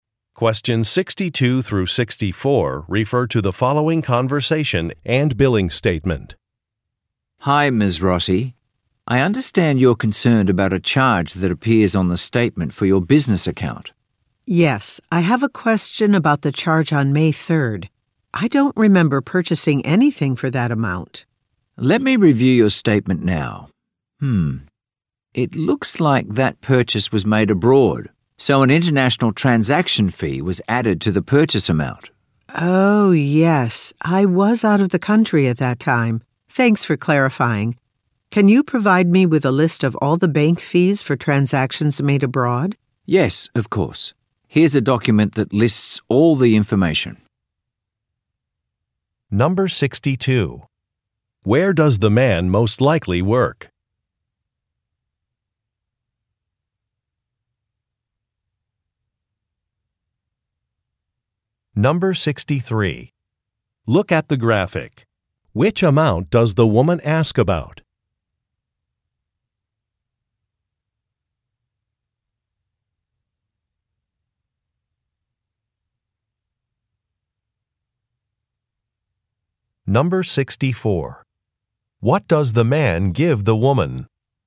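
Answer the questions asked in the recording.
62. At a bank
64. A document listing bank fees for transactions made abroad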